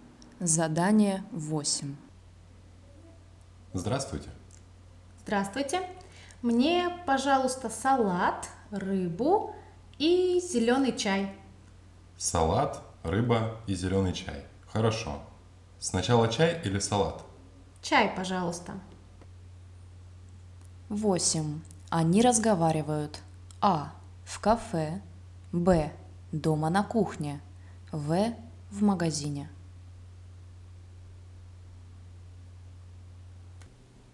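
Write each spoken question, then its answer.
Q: Они разговаривают. А. В кафе. Б. Дома на кухне. В. В магазине.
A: А: в кафе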